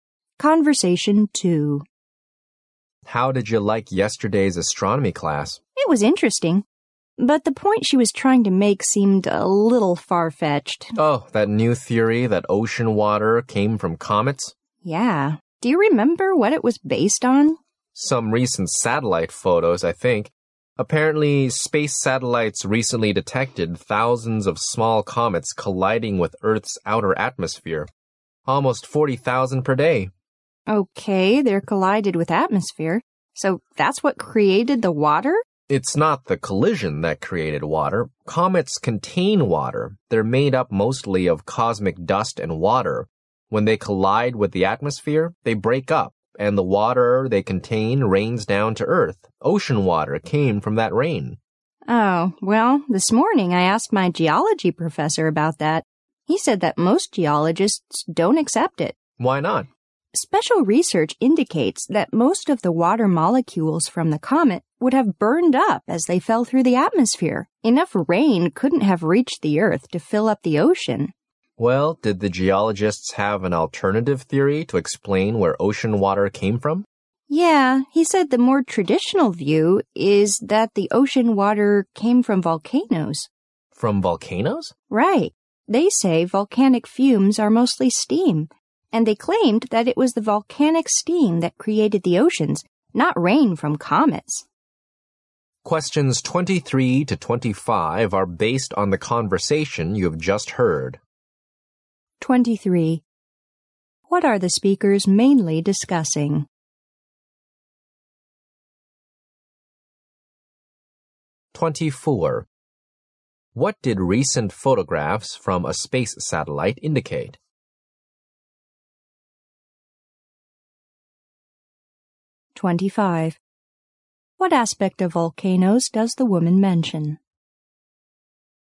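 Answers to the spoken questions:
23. Theories about where ocean water came from
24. Thousands of small comets collide with Earth's outer atmosphere every day
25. Volcanic fumes are mostly steam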